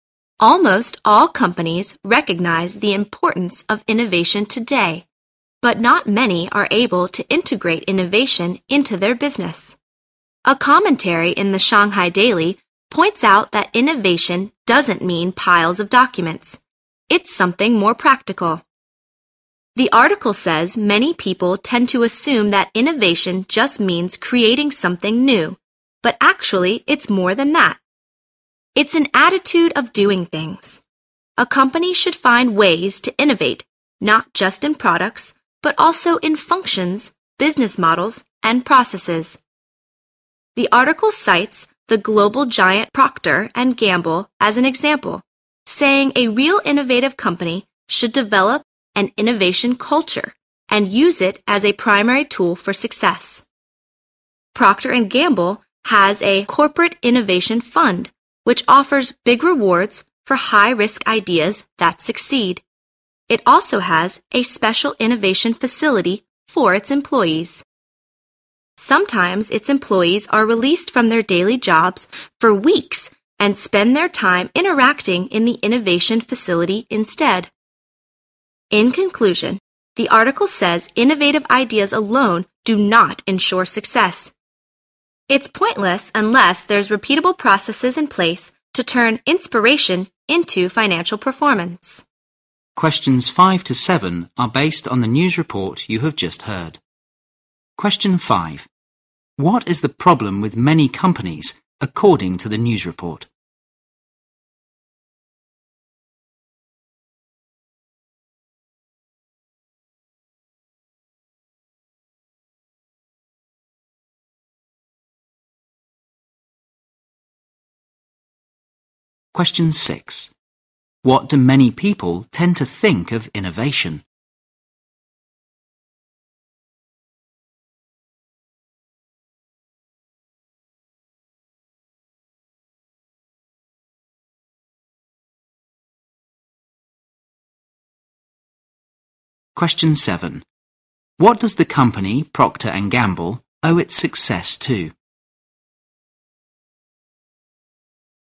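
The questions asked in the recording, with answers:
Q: What is the problem with many companies, according to the news report?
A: They are unable to integrate innovation into their business.

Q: What do many people tend to think of innovation?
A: It just means creating something new.

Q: What does the company Procter & Gamble owe its success to?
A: Its innovation culture, used as a primary tool for success.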